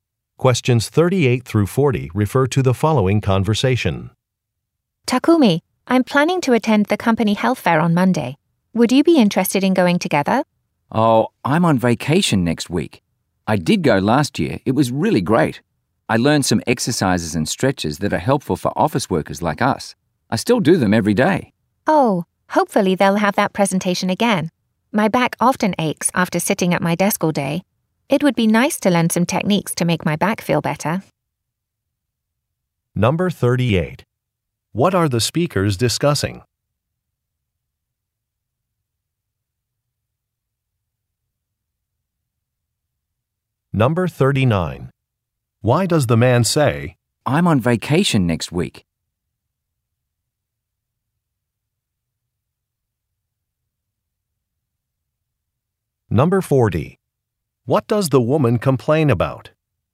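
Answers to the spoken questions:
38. A company health fair
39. He cannot attend the fair with her
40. Her back aches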